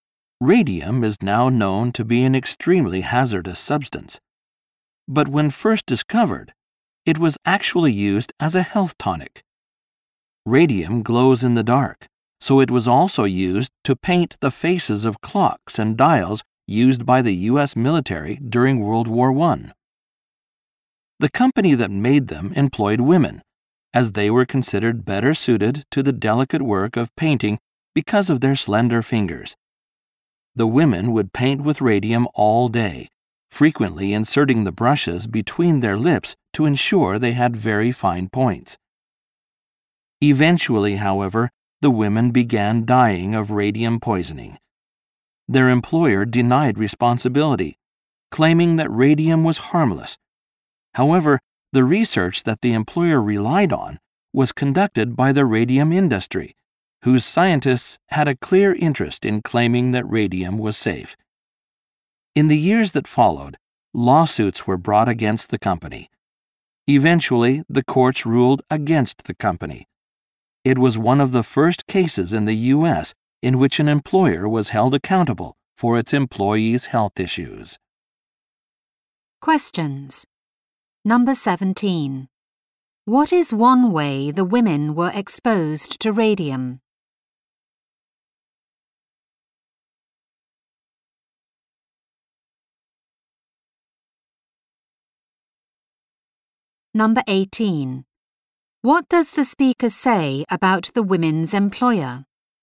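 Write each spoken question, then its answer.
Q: What is one way the women were exposed to radium?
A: They put radium-covered brushes between their lips to make fine points.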